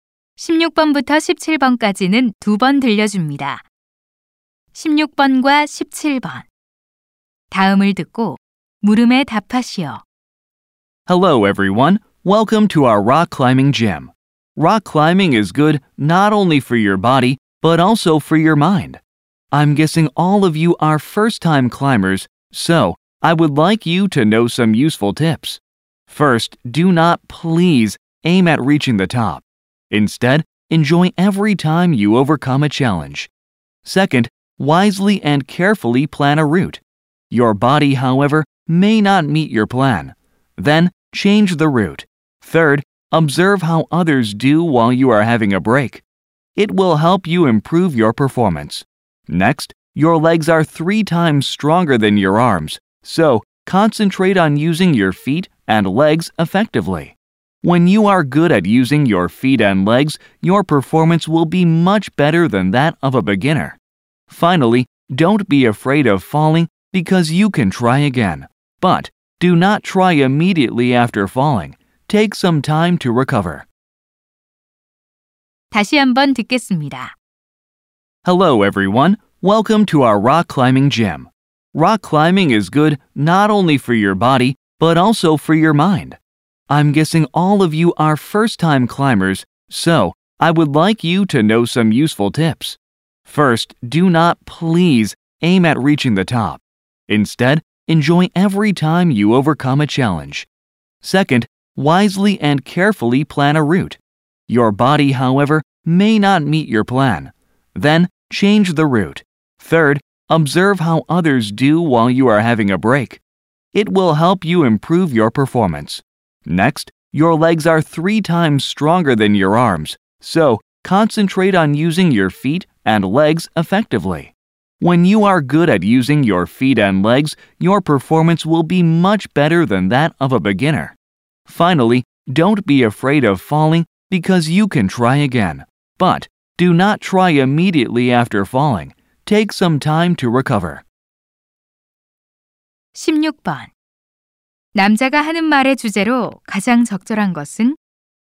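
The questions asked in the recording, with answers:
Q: 남자가 하는 말의 주제로 가장 적절한 것은?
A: 처음 암벽 등반하는 사람들을 위한 유용한 조언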